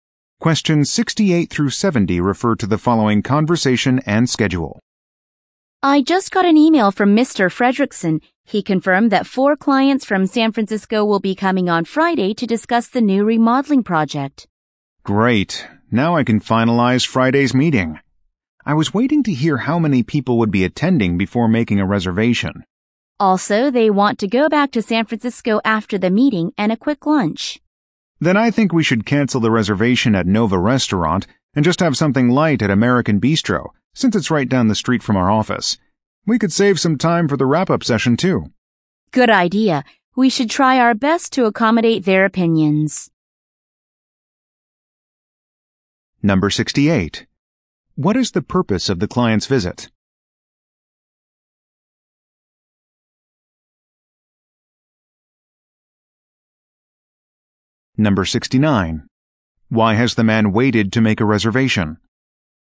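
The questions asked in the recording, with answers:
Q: What is the purpose of the client's visit?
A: To discuss the new remodeling project

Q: Why has the man waited to make a reservation?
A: He was waiting to know how many people would attend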